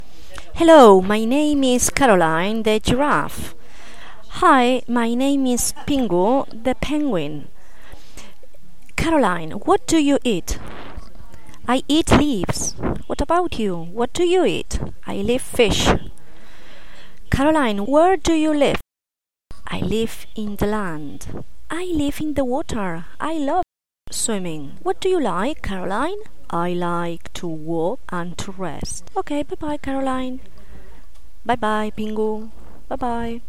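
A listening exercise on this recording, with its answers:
Listen to the story and to the dialogue and answer.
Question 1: What do giraffes eat?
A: leaves

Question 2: What do penguins eat?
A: fish

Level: 1st level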